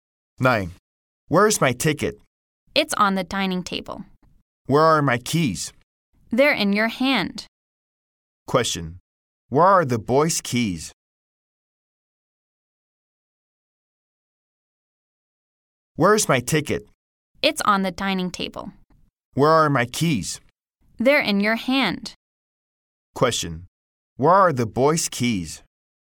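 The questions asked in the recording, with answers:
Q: Where are the boys' keys?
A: In his hand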